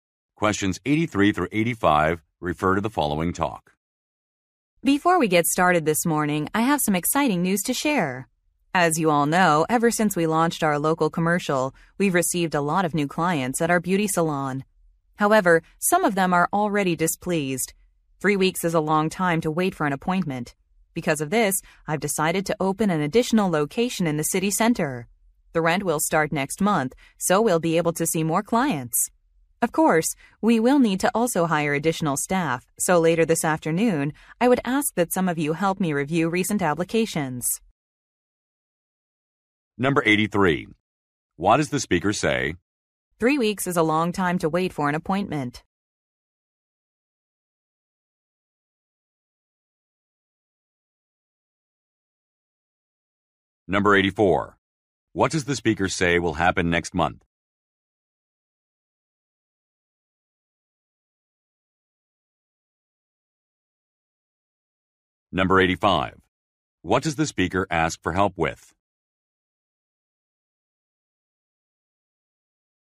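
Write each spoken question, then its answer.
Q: What does the speaker say will happen next month?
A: The rent on a new location will start

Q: What does the speaker ask for help with?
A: Reviewing job applications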